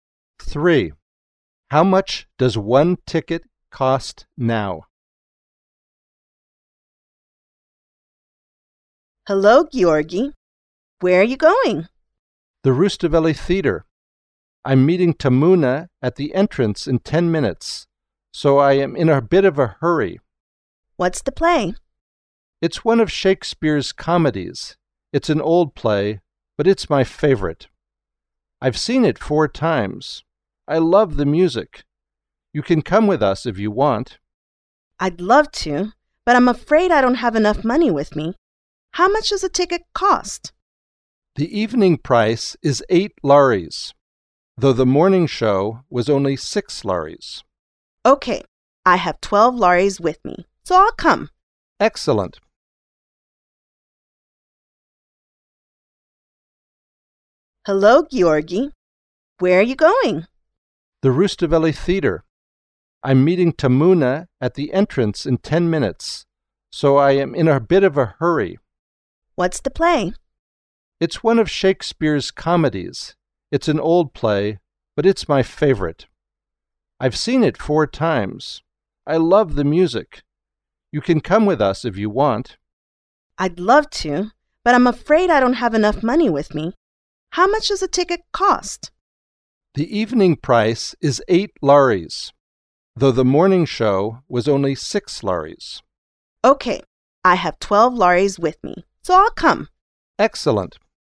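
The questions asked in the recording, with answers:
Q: How much does one ticket cost now?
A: 8 lari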